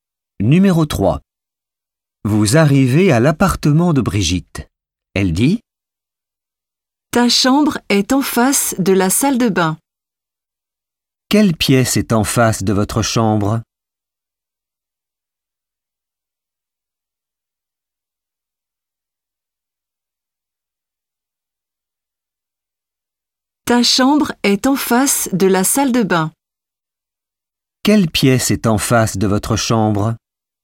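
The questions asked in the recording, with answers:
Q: Quelle pièce est en face de votre chambre?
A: La salle de bain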